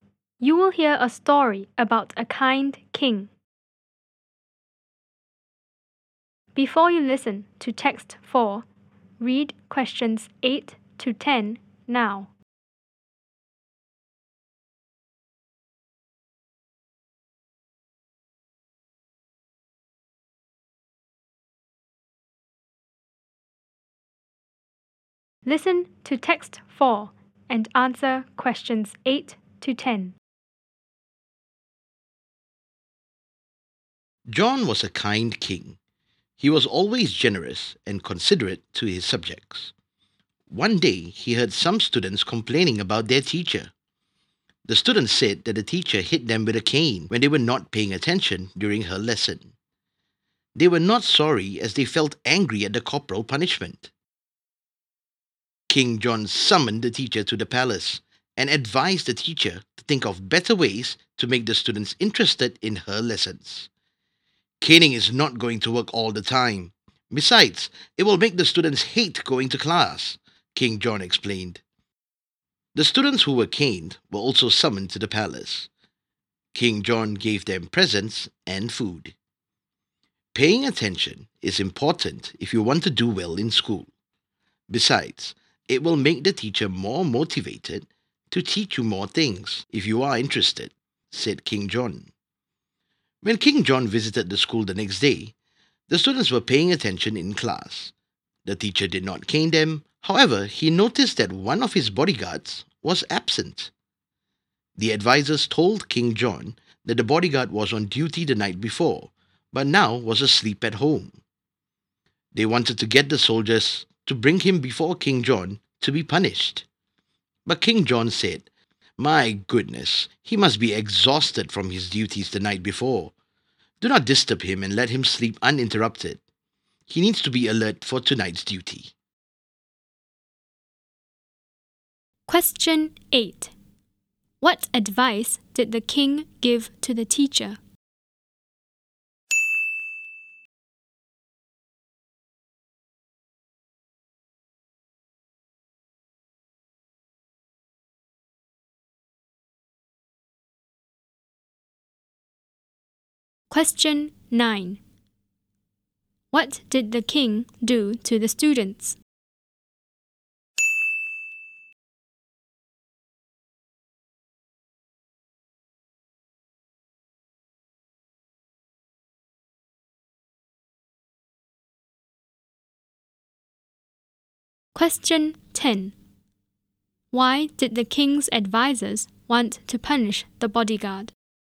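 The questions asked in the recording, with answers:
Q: What advice did the king give to the teacher?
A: To think of better ways to make the students interested in her lessons

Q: What did the king do to the students?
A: He summoned them to the palace and gave them presents and food

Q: Why did the king's advisors want to punish the bodyguard?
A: He was absent because he was asleep at home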